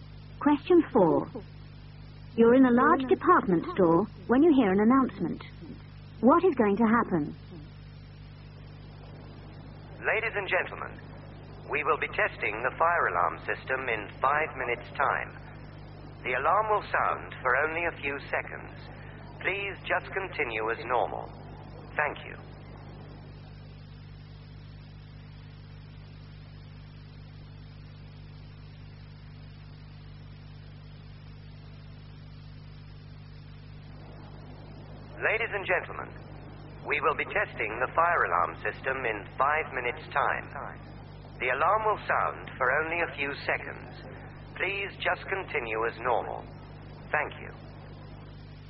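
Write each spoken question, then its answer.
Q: What is going to happen?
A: The fire alarm will be tested in 5 minutes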